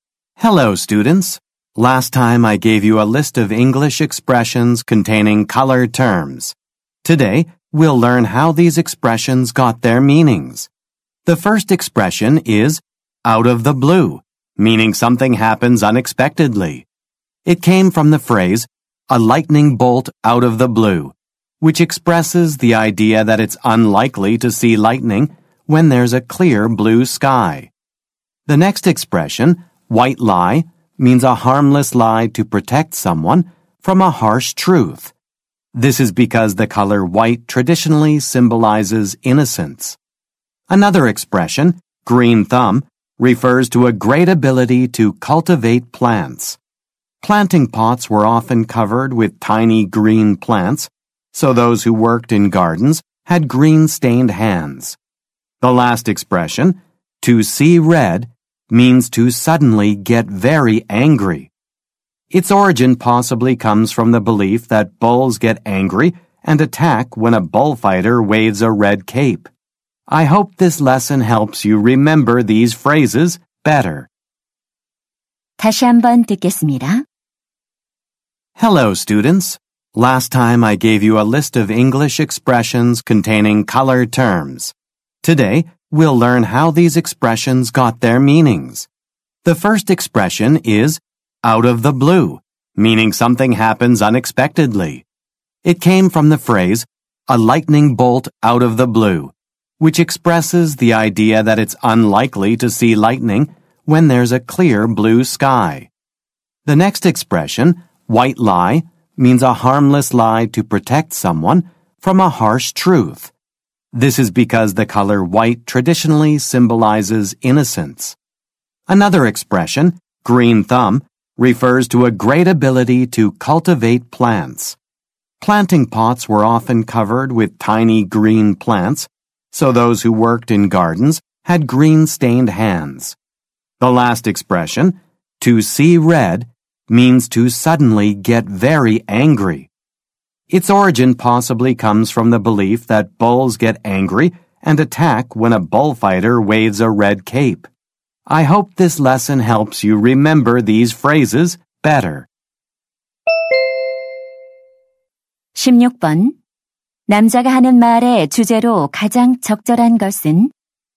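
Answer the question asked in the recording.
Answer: 색채 용어가 들어간 영어 표현의 유래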